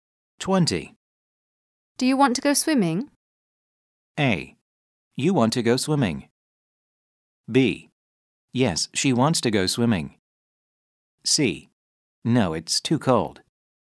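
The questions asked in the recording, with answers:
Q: Do you want to go swimming?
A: C: No, it's too cold.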